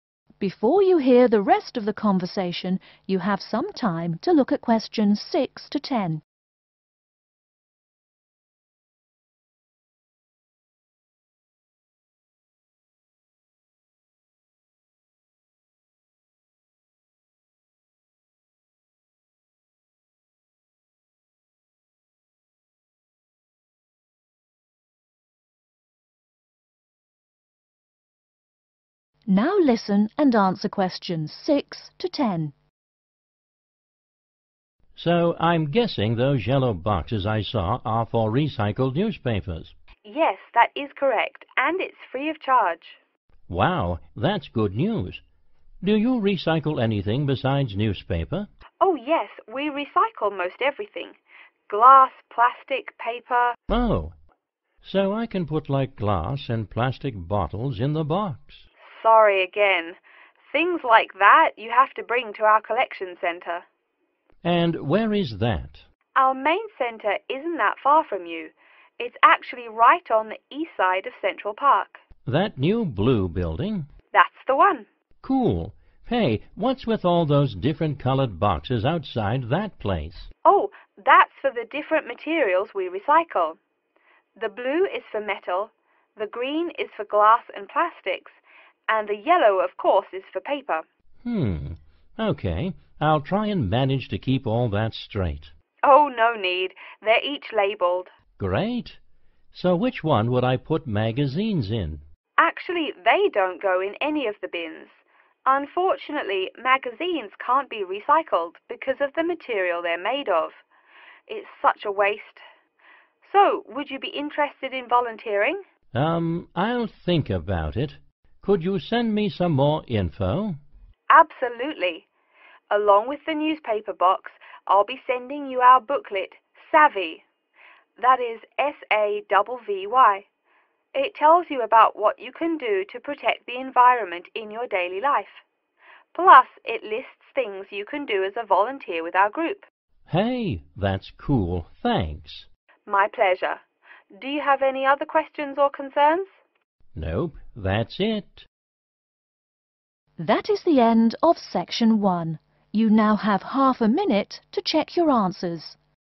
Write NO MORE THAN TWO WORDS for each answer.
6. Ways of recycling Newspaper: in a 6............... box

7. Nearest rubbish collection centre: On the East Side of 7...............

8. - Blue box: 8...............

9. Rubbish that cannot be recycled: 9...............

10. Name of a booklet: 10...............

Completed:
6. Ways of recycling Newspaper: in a yellow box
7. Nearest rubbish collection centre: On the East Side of Central Park
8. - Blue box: metal
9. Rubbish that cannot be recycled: magazines
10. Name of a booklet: Savvy